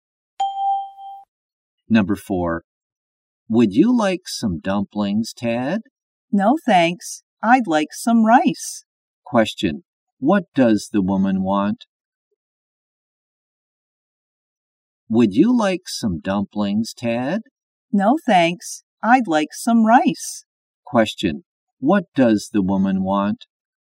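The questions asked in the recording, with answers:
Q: What does the woman want?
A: Some rice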